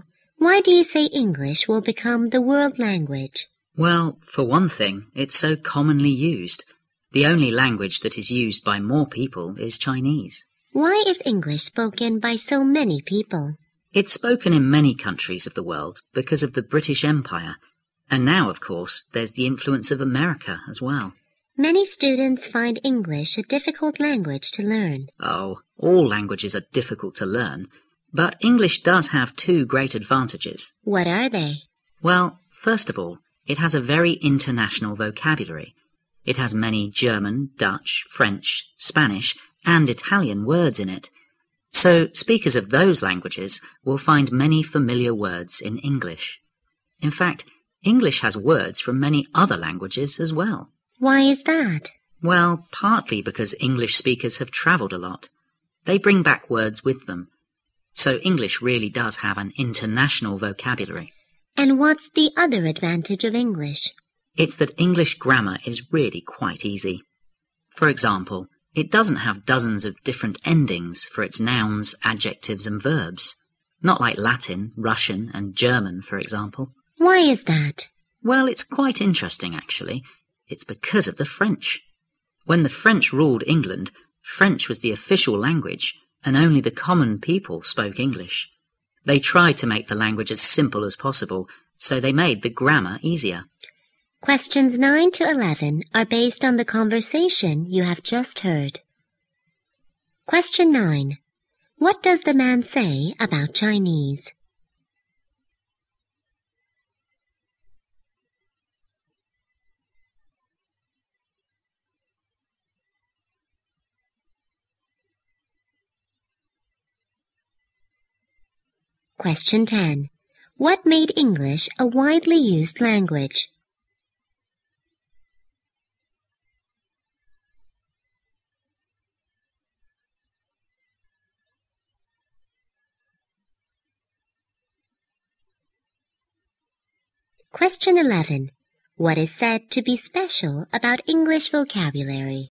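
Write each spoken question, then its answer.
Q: What does the man say about Chinese?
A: It is used by more people than English; it is the only language used by more people.

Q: What made English a widely used language?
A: The British Empire and the influence of America.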